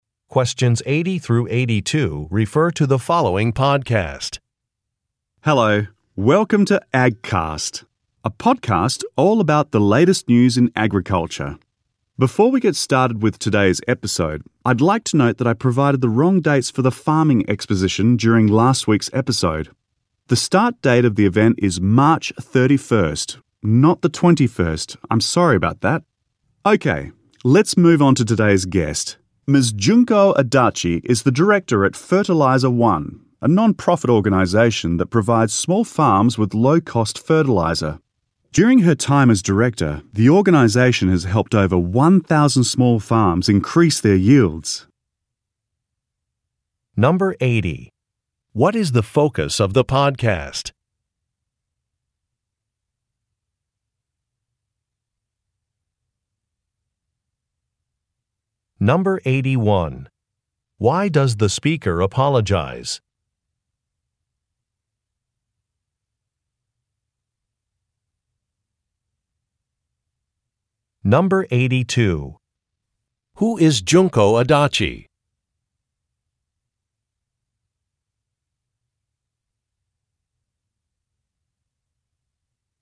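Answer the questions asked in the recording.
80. Agriculture
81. He gave the wrong dates for the farming exposition
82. The director of a non-profit organization (Fertilizer One)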